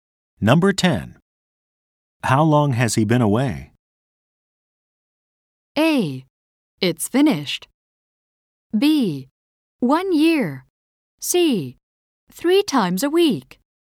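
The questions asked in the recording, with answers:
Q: How long has he been away?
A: B: 1 year.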